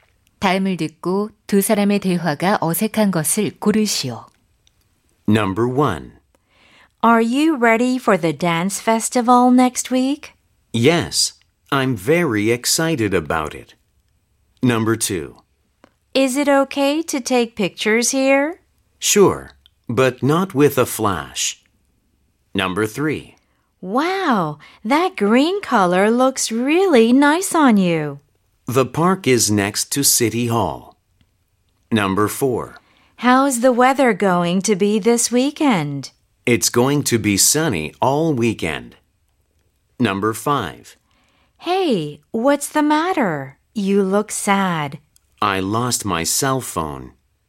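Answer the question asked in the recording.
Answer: 3번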